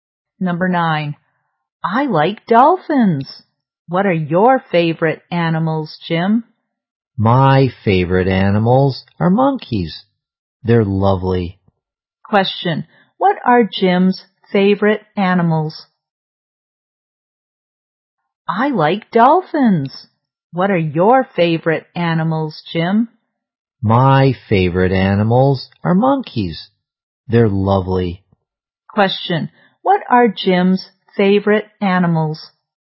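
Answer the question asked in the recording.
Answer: Monkeys.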